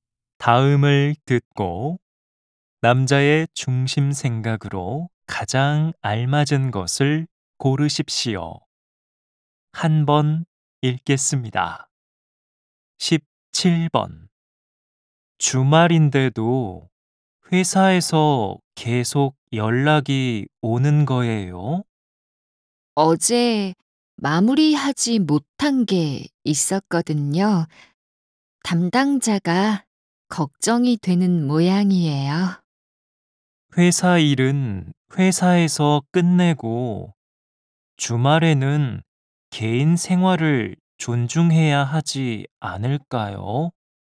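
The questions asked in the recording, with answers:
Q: 다음을 듣고 남자의 중심 생각으로 가장 알맞은 것을 고르십시오.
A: 회사 일은 회사에서 끝내고 주말에는 개인 생활을 존중해야 한다.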